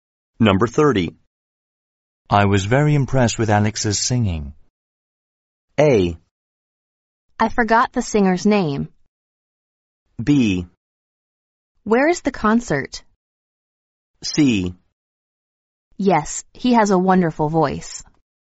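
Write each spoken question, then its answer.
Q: I was very impressed with Alex's singing.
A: C: Yes, he has a wonderful voice.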